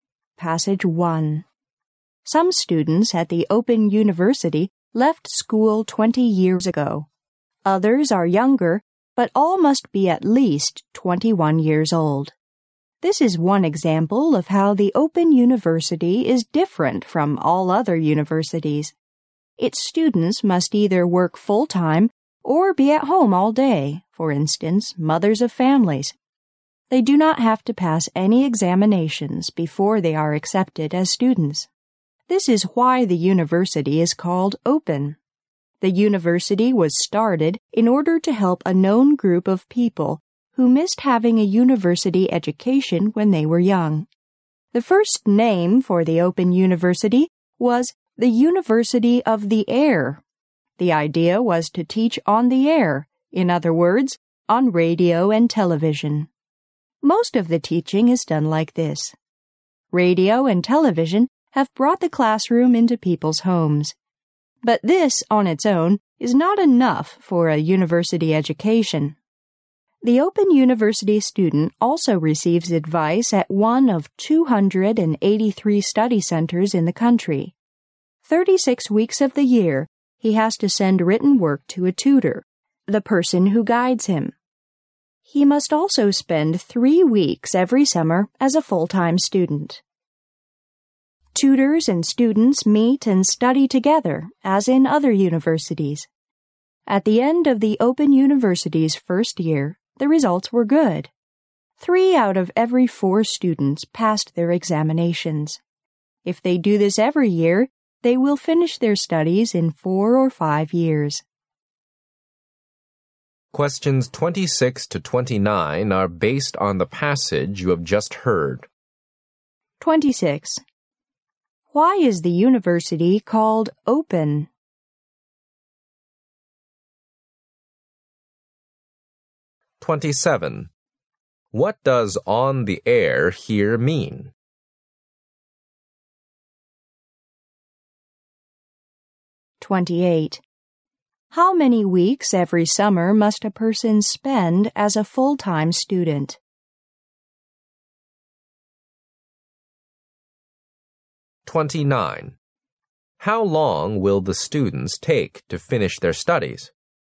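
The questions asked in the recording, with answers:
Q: Why is the university called Open?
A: Students don't have to pass any exams before being accepted.

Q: What does on the air here mean?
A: On radio and television.

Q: How many weeks every summer must a person spend as a full-time student?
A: Three weeks.

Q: How long will the students take to finish their studies?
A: Four or five years.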